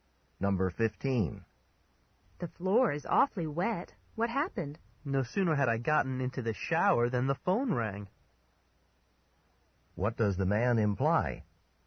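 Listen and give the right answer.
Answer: He got out of the shower to answer the phone, dripping water.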